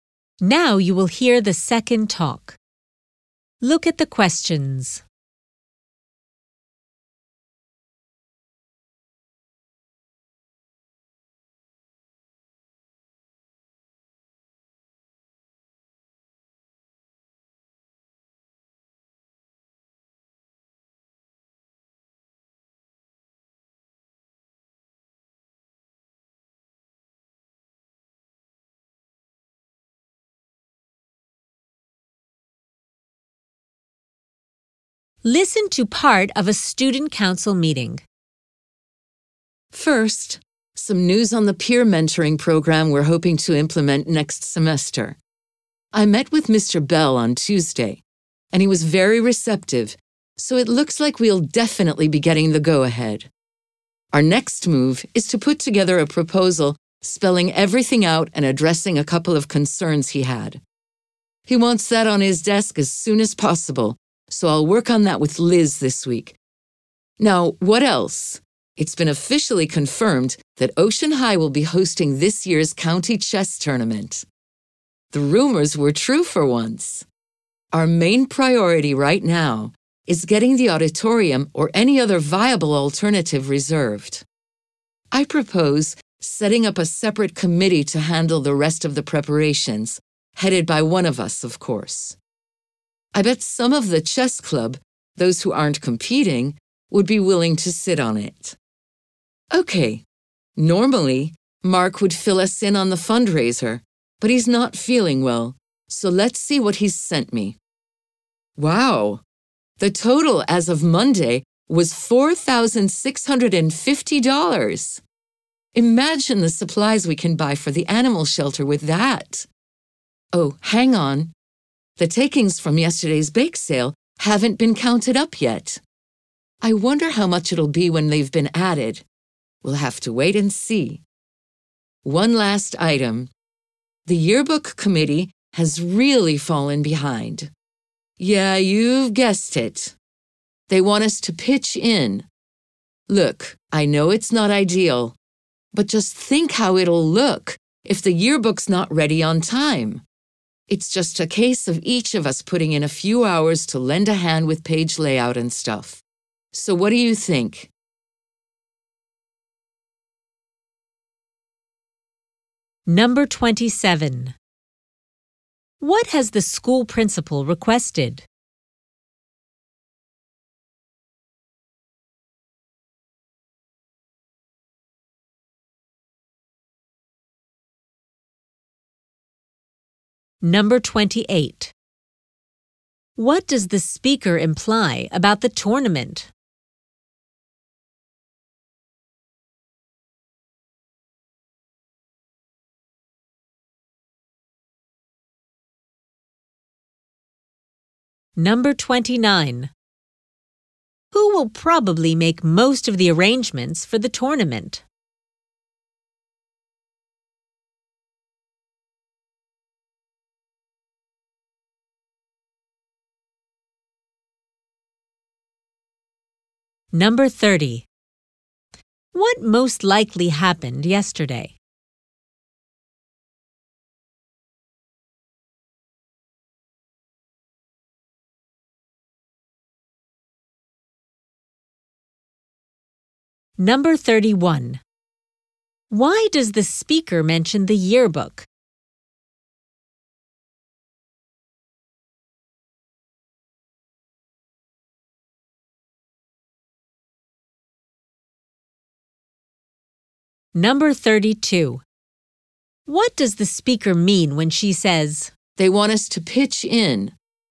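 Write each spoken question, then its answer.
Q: What has the school principal requested?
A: A proposal for the peer mentoring program as soon as possible

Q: Who will probably make most of the arrangements for the tournament?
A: A separate committee, probably including chess club members

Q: What most likely happened yesterday?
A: A bake sale was held to raise funds

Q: Why does the speaker mention the yearbook?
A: To ask the council to help the yearbook committee

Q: What does the speaker mean when she says,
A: The yearbook committee wants the council to help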